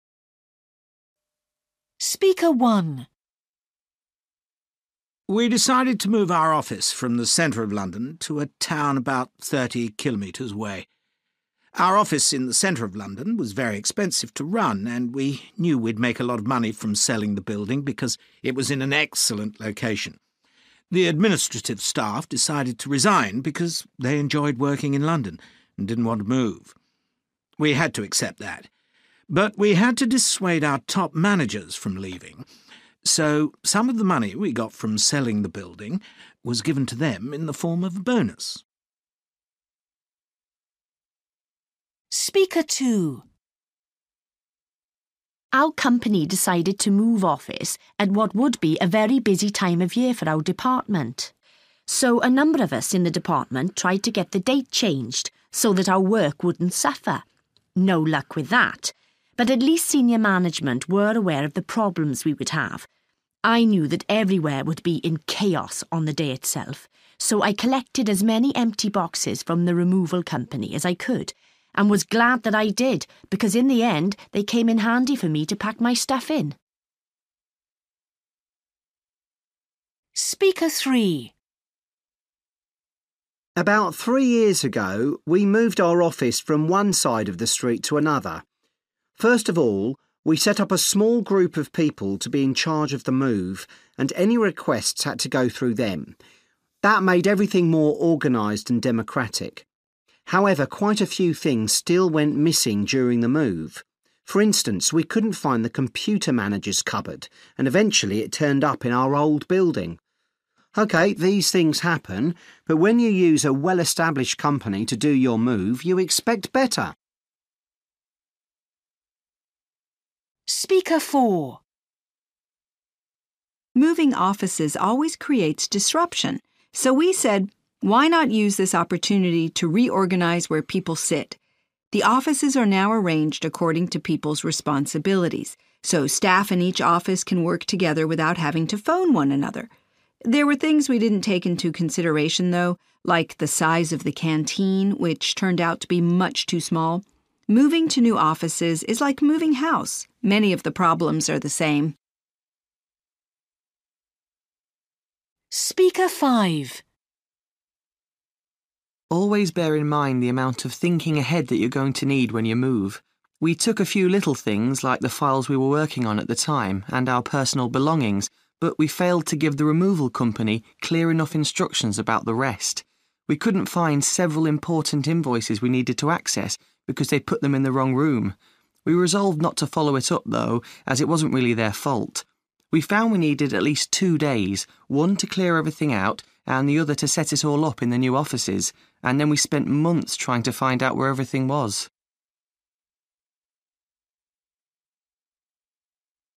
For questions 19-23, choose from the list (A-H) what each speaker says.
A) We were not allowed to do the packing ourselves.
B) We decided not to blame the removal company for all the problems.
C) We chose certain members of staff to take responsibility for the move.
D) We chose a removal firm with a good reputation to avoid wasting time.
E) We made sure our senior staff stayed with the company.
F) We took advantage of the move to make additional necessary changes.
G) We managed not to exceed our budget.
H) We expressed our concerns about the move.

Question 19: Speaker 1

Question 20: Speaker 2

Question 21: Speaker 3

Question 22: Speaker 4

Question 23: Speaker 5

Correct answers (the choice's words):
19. We made sure our senior staff stayed with the company.
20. We expressed our concerns about the move.
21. We chose certain members of staff to take responsibility for the move.
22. We took advantage of the move to make additional necessary changes.
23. We decided not to blame the removal company for all the problems.

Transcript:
We decided to move our office from the centre of London to a town about thirty kilometres away. Our office in the centre of London was very expensive to run and we knew we'd make a lot of money from selling the building because it was in an excellent location. The administrative staff decided to resign because they enjoyed working in London and didn't want to move. We had to accept that, but we had to dissuade our top managers from leaving, so some of the money we got from selling the building was given to them in the form of a bonus.
Our company decided to move office at what would be a very busy time of year for our department. So a number of us in the department tried to get the date changed so that our work wouldn't suffer. No luck with that, but at least senior management were aware of the problems we would have. I knew that everywhere would be in chaos on the day itself, so I collected as many empty boxes from the removal company as I could and was glad that I did, because in the end they came in handy for me to pack my stuff in.
About three years ago we moved our office from one side of the street to another. First of all, we set up a small group of people to be in charge of the move and any requests had to go through them. That made everything more organised and democratic. However, quite a few things still went missing during the move. For instance, we couldn't find the computer manager's cupboard and eventually it turned up in our old building. OK, these things happen, but when you use a well-established company to do your move, you expect better.
Moving offices always creates disruption, so we said, why not use this opportunity to reorganise where people sit. The offices are now arranged according to people's responsibilities. So staff in each office can work together without having to phone one another. There were things we didn't take into consideration though, like the size of the canteen, which turned out to be much too small. Moving to new offices is like moving house; many of the problems are the same.
Always bear in mind the amount of thinking ahead that you're going to need when you move. We took a few little things like the files we were working on at the time and our personal belongings, but we failed to give the removal company clear enough instructions about the rest. We couldn't find several important invoices we needed to access, because they'd put them in the wrong room. We resolved not to follow it up, though, as it wasn't really their fault. We found we needed at least two days; one to clear everything out, and the other to set it all up in the new offices. And then we spent months trying to find out where everything was.

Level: B2